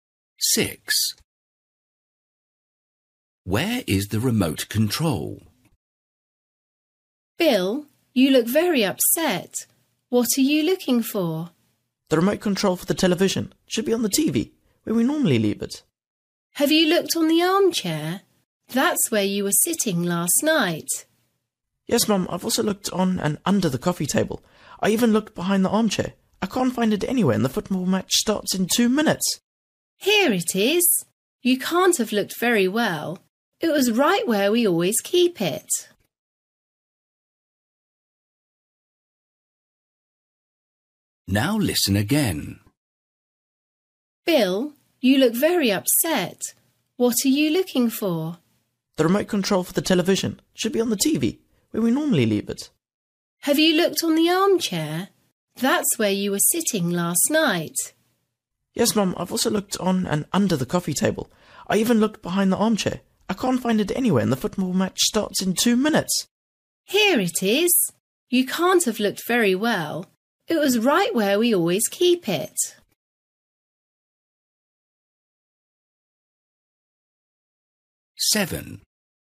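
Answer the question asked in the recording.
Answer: On the TV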